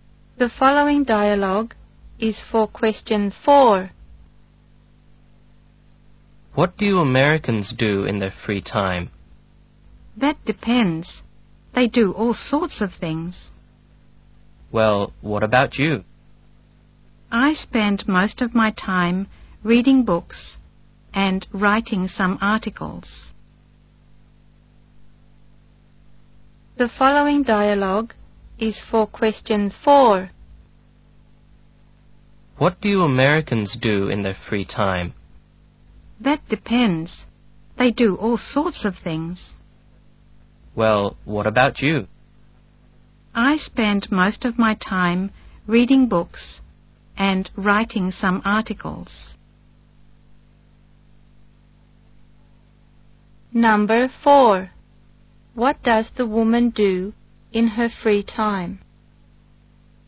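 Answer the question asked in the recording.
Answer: Reads books and writes articles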